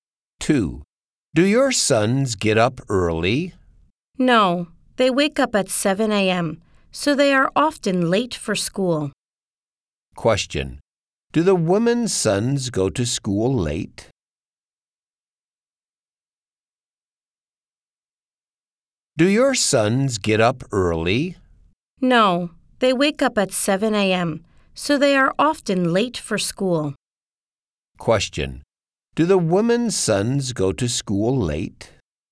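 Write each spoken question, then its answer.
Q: Do the women's sons go to school late?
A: Yes, they are often late for school.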